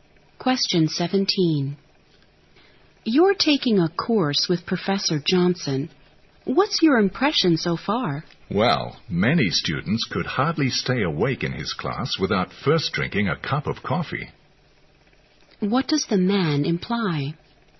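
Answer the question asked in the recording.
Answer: Professor Johnson's class is boring.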